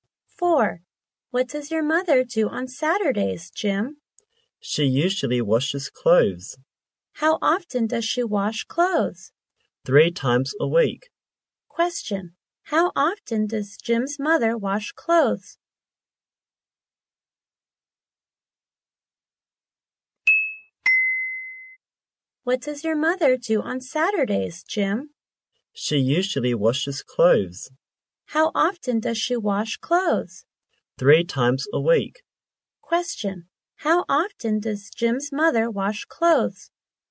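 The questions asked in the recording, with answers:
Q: How often does Jim's mother wash clothes?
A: 3 times a week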